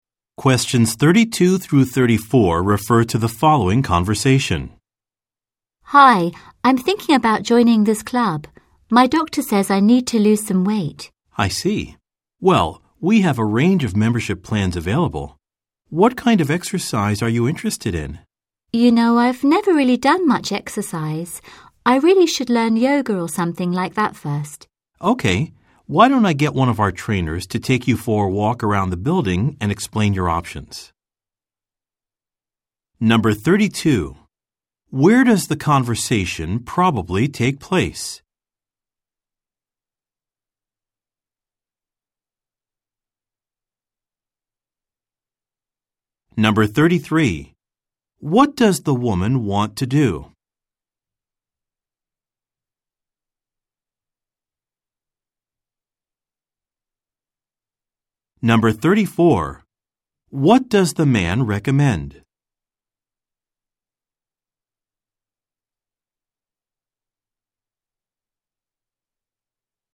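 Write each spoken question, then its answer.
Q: Where does the conversation probably take place?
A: At a fitness club (gym)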